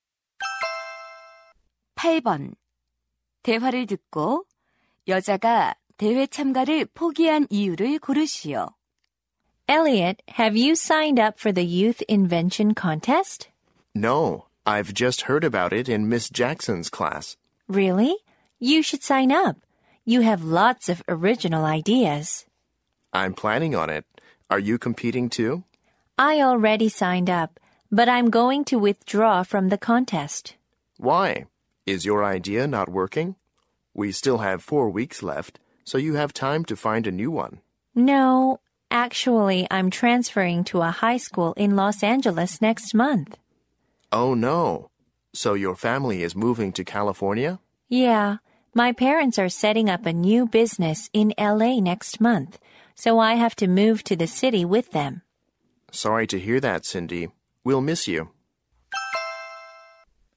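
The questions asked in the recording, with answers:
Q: 대화를 듣고 여자가 대회 참가를 포기한 이유를 고르시오.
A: 다른 도시(LA)로 전학을 가야 해서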